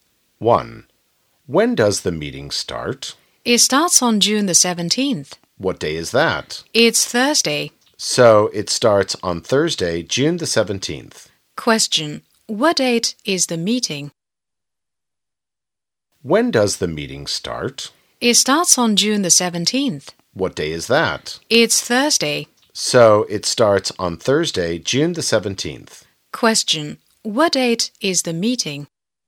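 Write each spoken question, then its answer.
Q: What date is the meeting?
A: Thursday, June the 17th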